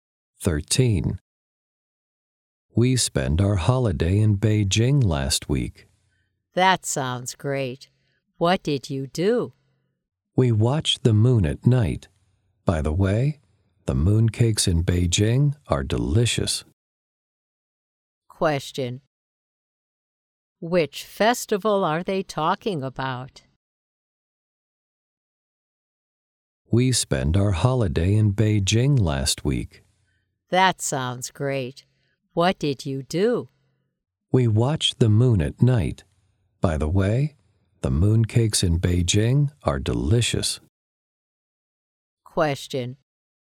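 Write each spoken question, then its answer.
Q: Which festival are they talking about?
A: The Mid-Autumn Festival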